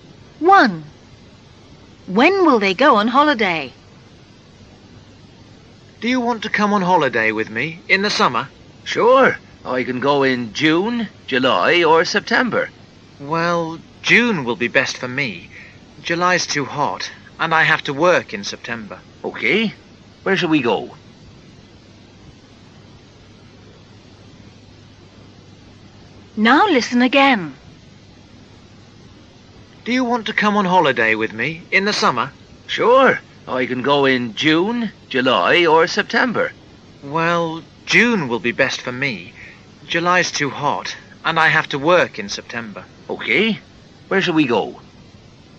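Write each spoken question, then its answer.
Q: When will they go on holiday?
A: In June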